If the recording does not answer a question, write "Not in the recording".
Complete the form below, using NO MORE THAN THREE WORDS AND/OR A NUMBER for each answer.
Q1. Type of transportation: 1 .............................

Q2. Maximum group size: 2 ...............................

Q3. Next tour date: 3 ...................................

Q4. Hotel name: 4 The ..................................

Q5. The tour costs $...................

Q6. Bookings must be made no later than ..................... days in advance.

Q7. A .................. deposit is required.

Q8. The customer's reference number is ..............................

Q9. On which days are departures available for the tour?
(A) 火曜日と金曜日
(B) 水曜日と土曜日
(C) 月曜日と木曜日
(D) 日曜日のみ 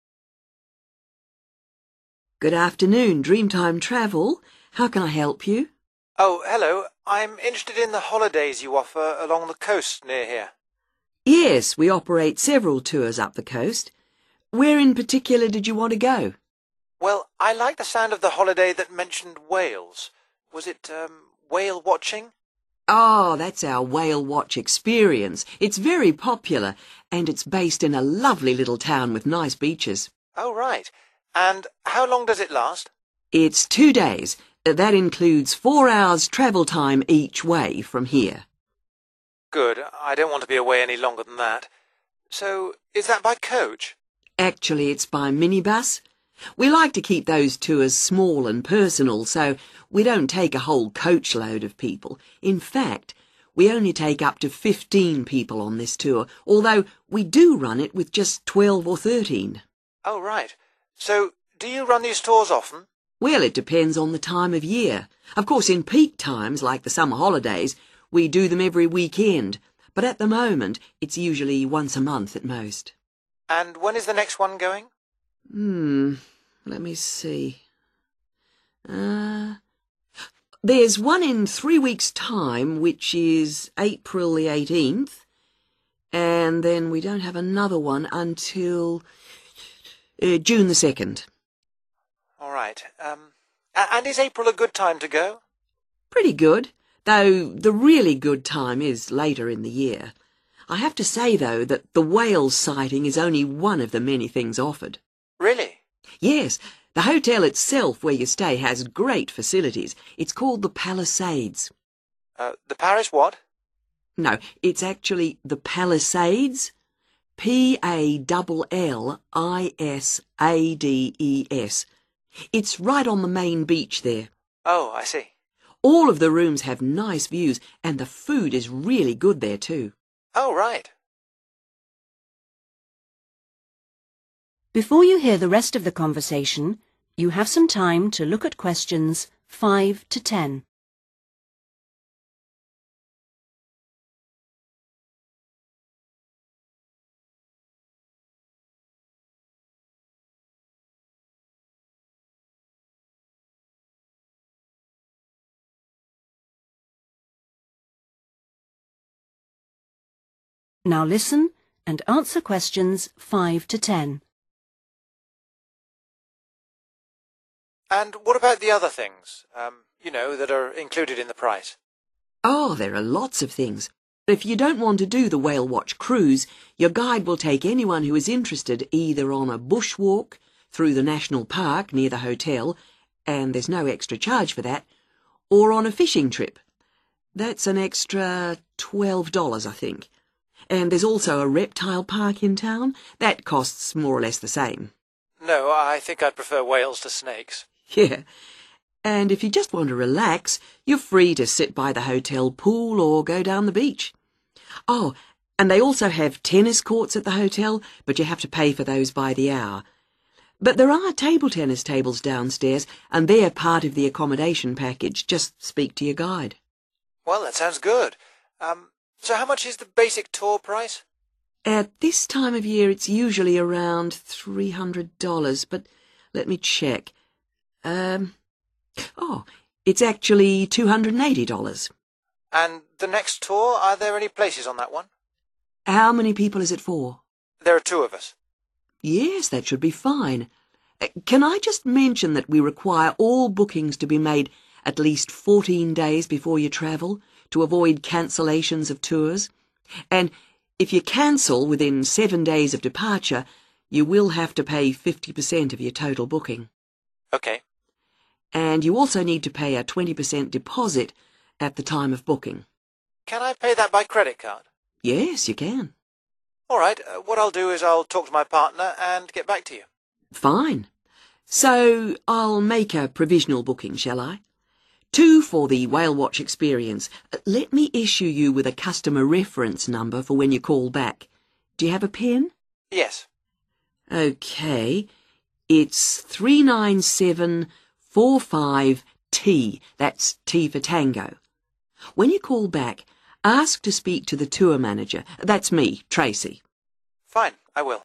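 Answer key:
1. minibus
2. 15
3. April 18th
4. Palisades
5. 280
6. 14
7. 20%
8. 39745T
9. Not in the recording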